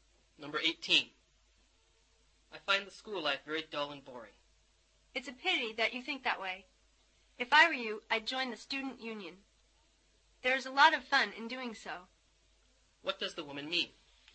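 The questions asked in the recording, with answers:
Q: What does the woman mean?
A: He should join the student union.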